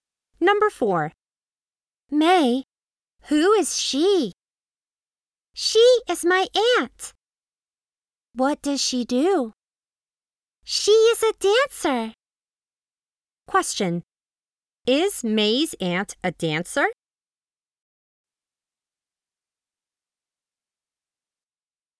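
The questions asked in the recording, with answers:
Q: Is May's aunt a dancer?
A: Yes, she is.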